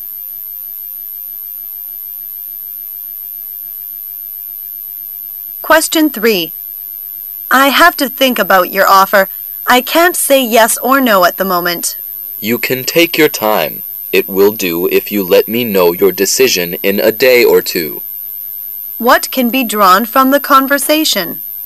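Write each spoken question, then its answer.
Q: What can be drawn from the conversation?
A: The speaker needs time to think about the offer and can answer in a day or two.

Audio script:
[解析] W: I have to think about your offer. I can't say yes or no at the moment. M: You can take your time. It will do if you let me know your decision in a day or two. Q: What can be drawn from the conversation?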